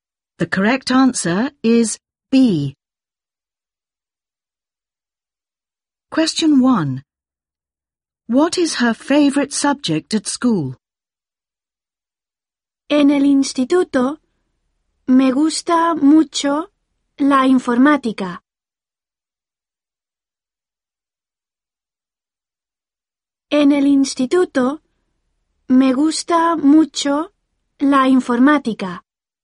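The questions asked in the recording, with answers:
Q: What is her favorite subject at school?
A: ICT / computing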